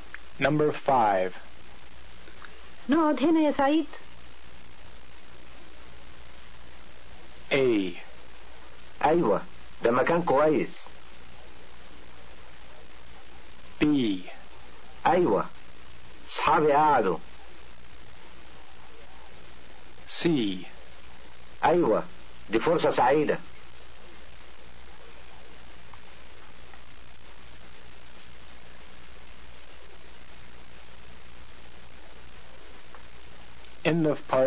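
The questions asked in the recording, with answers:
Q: نقعد هنا يا سعيد.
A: A: أيوة ده مكان كويس.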